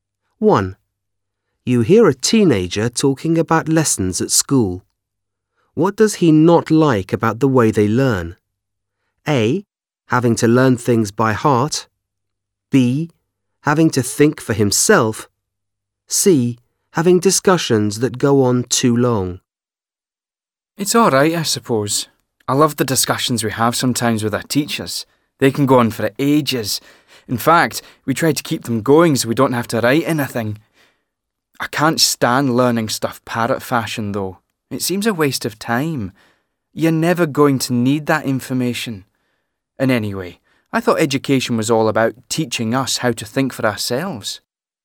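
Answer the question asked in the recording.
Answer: A: Having to learn things by heart.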